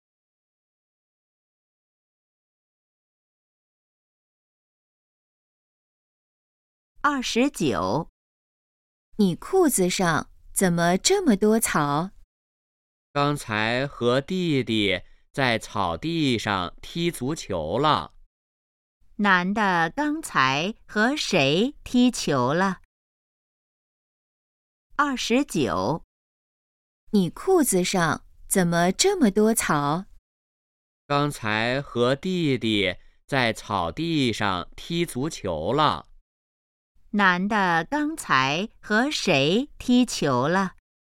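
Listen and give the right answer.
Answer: 弟弟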